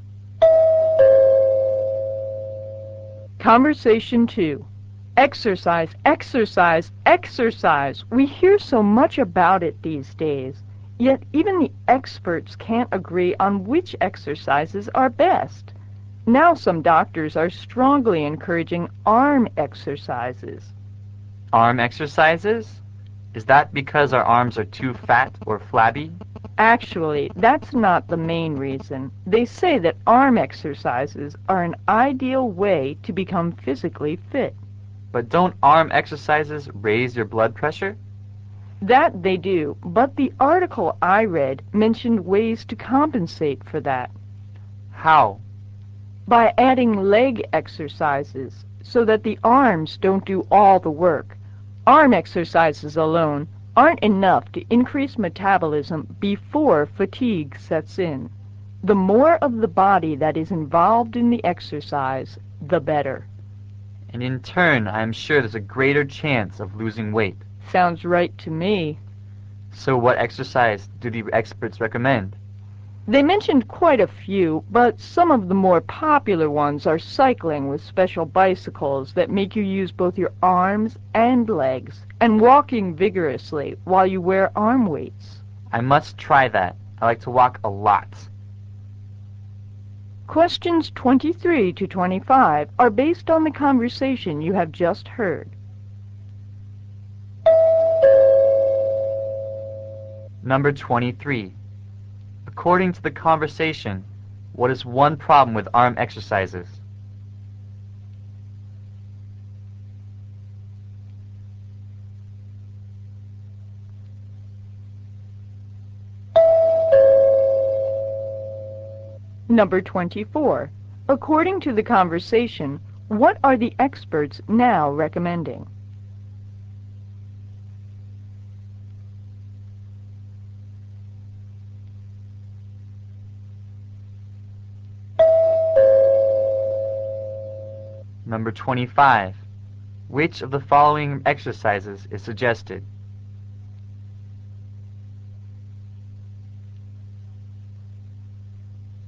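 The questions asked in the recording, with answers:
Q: According to the conversation, what is one problem with arm exercises?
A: They raise blood pressure

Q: According to the conversation, what are the experts now recommending?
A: Combining arm exercises with leg exercises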